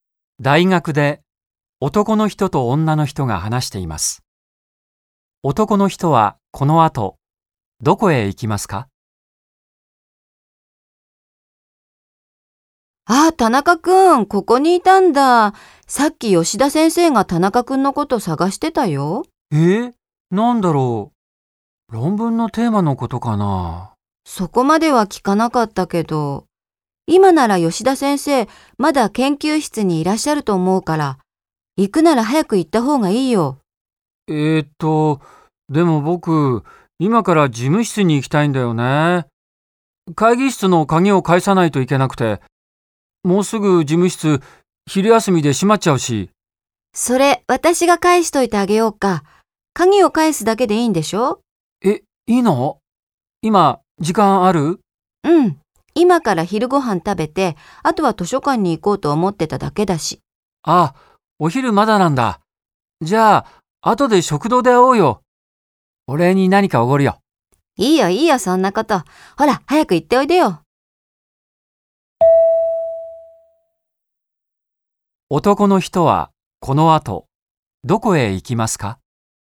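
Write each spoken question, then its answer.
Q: 男の人はこの後どこへ行きますか?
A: 吉田先生の研究室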